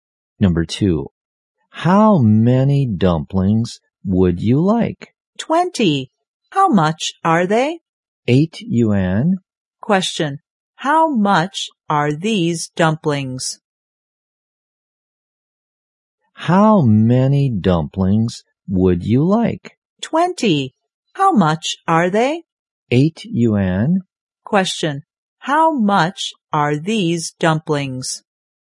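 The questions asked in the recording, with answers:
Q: how much are these dumplings?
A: 8 yuan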